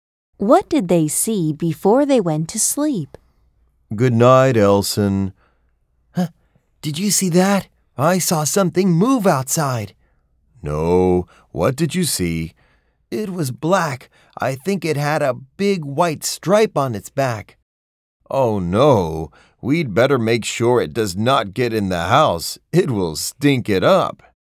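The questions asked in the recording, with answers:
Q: What did they see before they went to sleep?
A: A skunk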